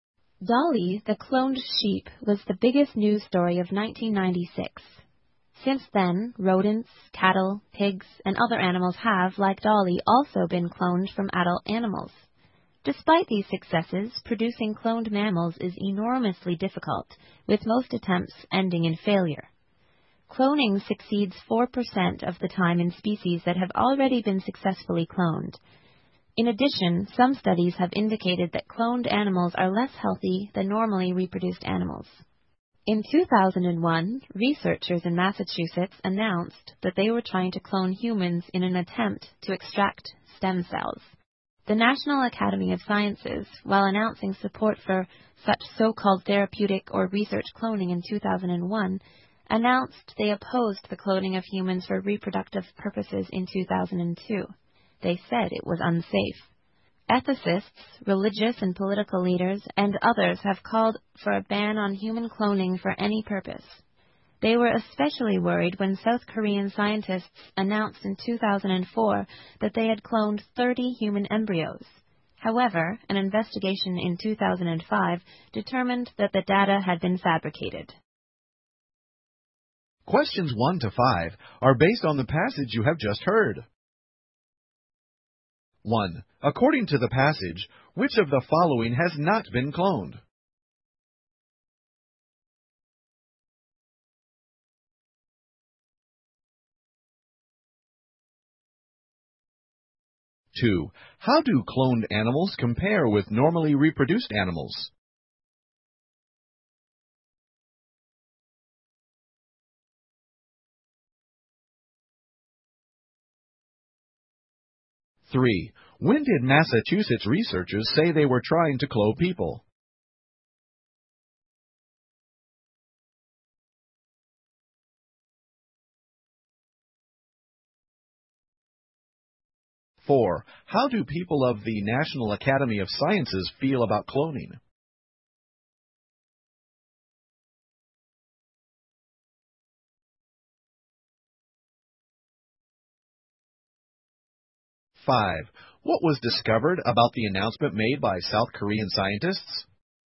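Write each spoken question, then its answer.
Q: How do cloned animals compare with normally reproduced animals?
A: They are less healthy.

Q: When did Massachusetts researchers say they were trying to clone people?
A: In 2001

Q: What was discovered about the announcement made by South Korean scientists?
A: The data had been fabricated.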